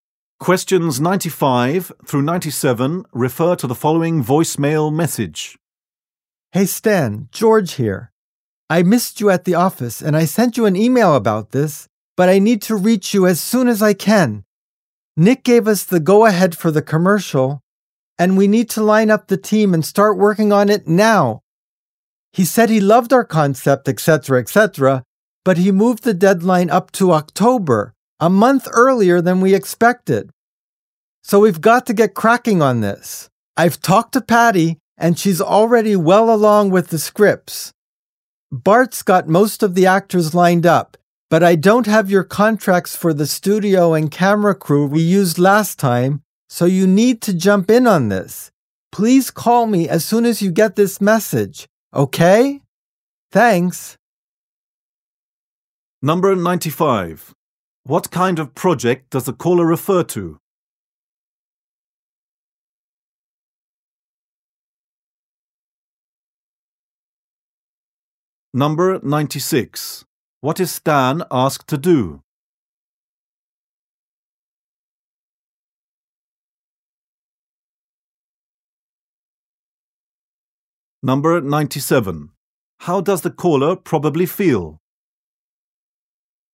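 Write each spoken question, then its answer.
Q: What kind of project does the caller refer to?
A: A commercial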